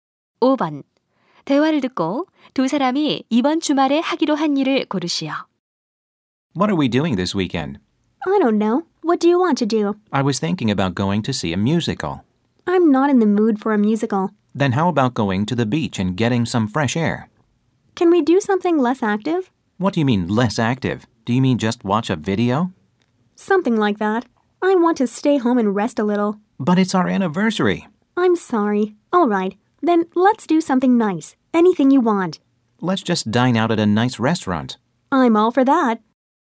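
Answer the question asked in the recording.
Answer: 멋진 레스토랑에서 외식하기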